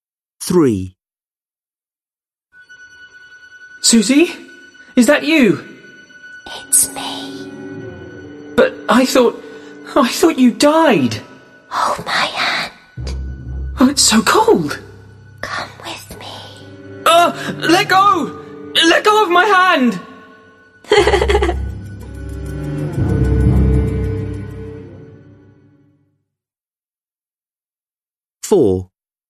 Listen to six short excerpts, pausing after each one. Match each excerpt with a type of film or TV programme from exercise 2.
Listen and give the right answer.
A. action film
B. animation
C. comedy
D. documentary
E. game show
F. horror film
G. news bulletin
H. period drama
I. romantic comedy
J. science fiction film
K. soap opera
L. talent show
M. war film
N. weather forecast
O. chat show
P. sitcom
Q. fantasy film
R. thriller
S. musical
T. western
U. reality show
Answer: F. horror film

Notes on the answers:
Boy: Suzie? Is that you? Suzie: It's me. Boy: But I thought ... I thought you died. Suzie: Hold my hand. Boy: It's so cold. Suzie: Come with me! Boy: Argh! Let go! Let go of my hand!

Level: Lớp 10